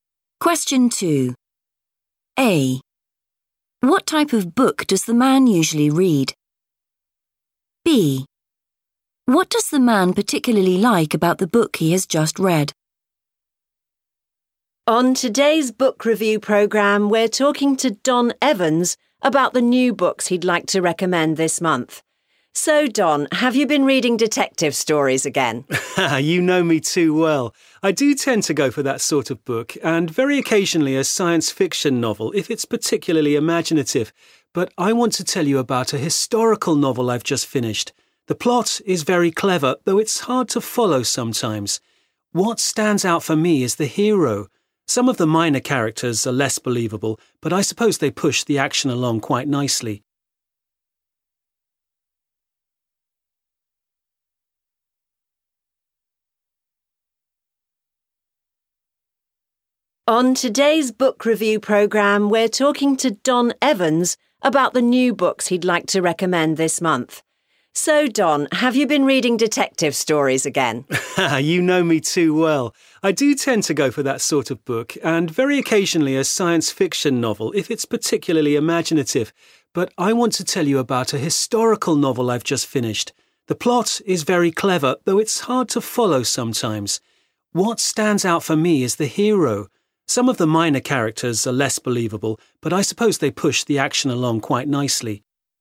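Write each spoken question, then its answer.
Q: What type of book does the man usually read?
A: detective stories

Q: What does the man particularly like about the book he has just read?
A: the hero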